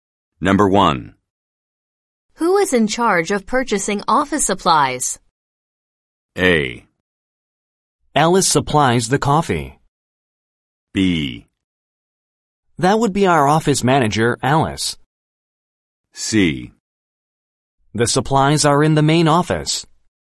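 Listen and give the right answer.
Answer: B: That would be our office manager, Alice.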